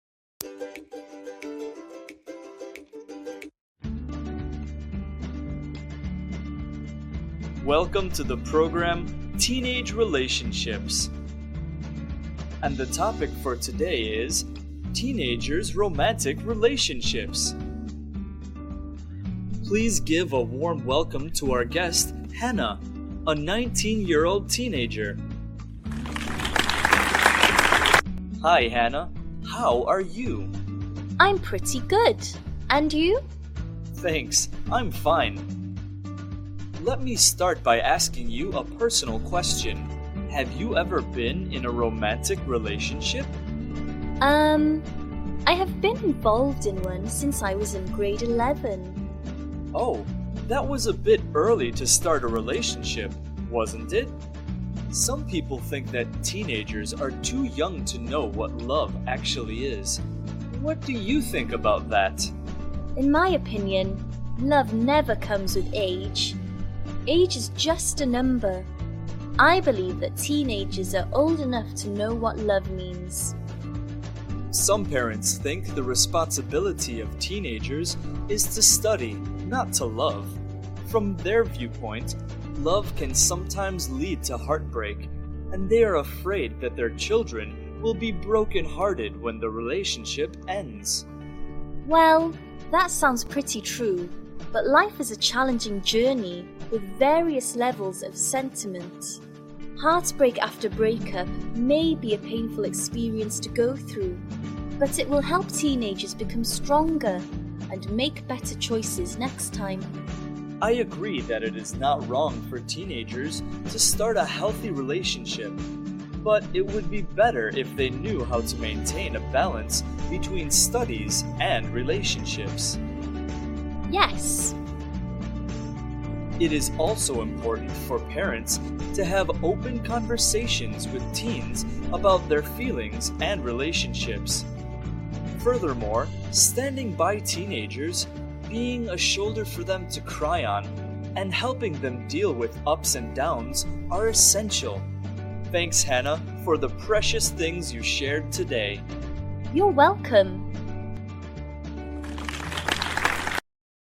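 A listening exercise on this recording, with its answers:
Task: Decide whether the following statements are True (T) or False (F).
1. Hannah has never been in a romantic relationship.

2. She believes that love depends on age.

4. She thinks heartbreak can help teenagers grow stronger.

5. The host agrees that teens should balance love and studies.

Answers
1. False
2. False
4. True
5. True

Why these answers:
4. Breakups help teens grow
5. Balance between study and relationship

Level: lớp 11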